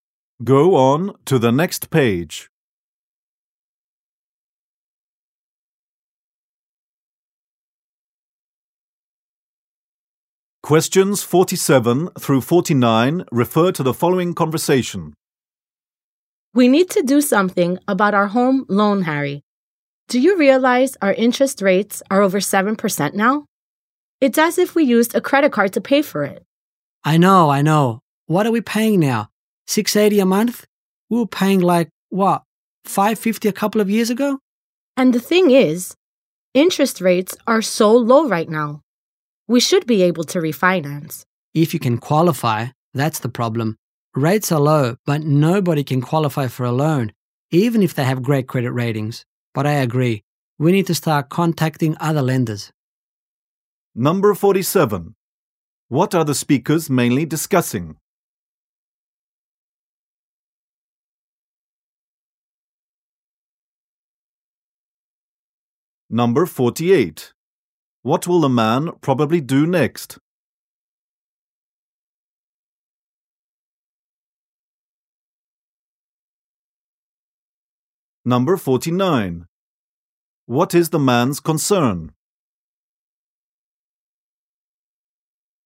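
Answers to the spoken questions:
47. Refinancing their home loan
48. Start contacting other lenders
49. Whether they can qualify for a loan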